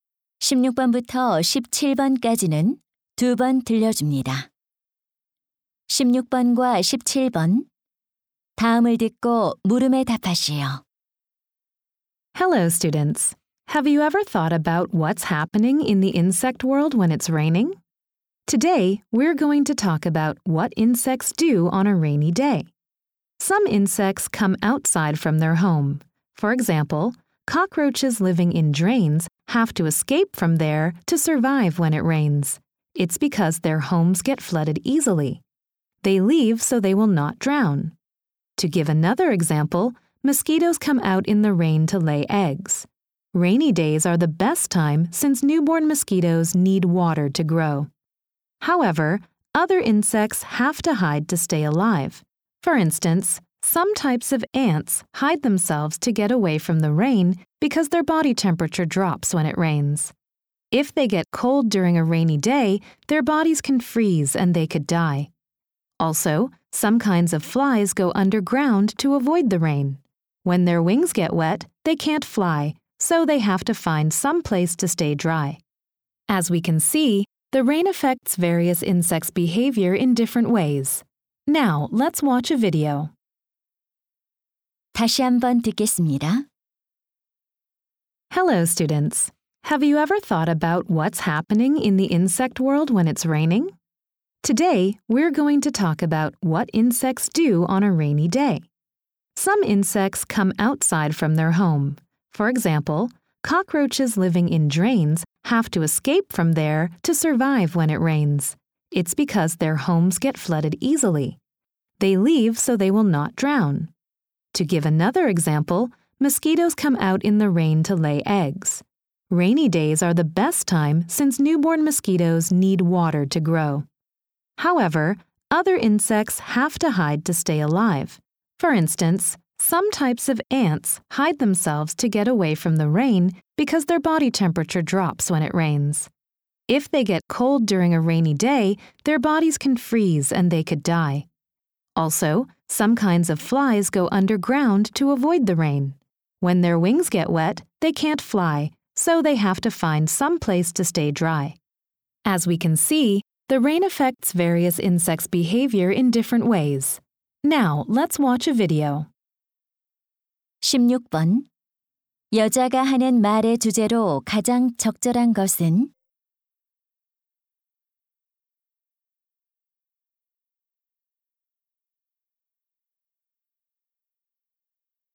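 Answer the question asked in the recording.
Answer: 비가 곤충의 행동에 미치는 다양한 영향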